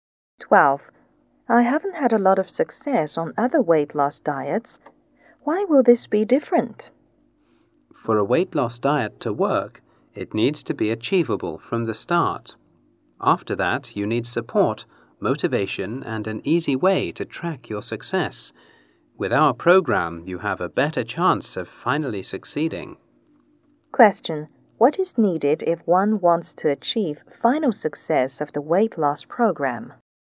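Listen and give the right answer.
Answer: An achievable start, plus support, motivation and an easy way to track success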